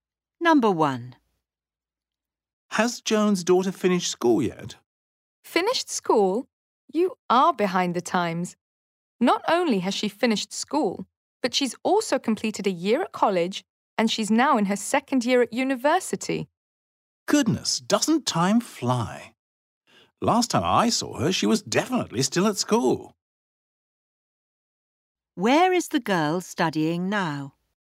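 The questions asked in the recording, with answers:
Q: Where is the girl studying now?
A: At university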